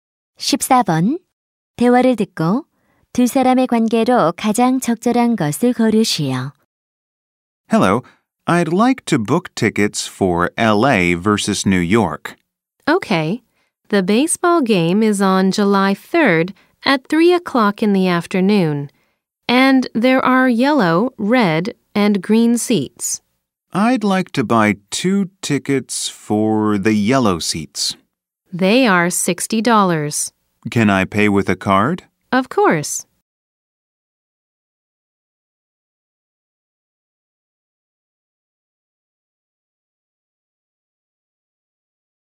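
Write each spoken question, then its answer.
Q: 대화를 듣고 두 사람의 관계로 가장 적절한 것을 고르시오.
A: 매표 직원과 고객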